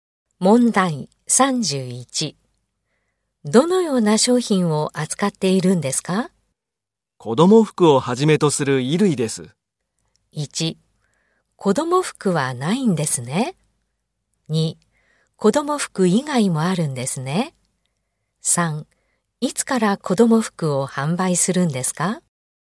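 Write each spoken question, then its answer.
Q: どのような商品を扱っているんですか?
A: 2: 子供服以外もあるんですね。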